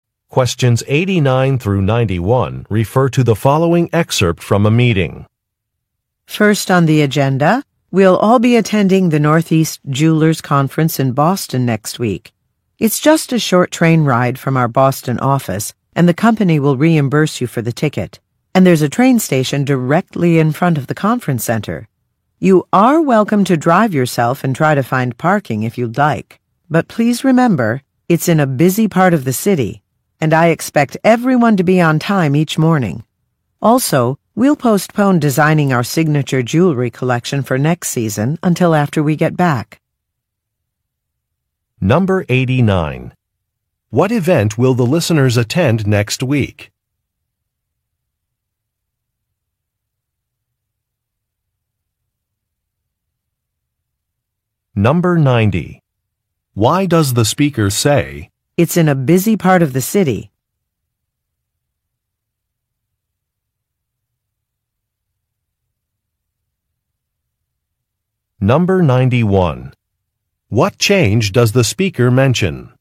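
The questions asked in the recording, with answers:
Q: What event will the listeners attend next week?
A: The Northeast Jewelers Conference in Boston

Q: What change does the speaker mention?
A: Designing the signature jewelry collection for next season is postponed until after the conference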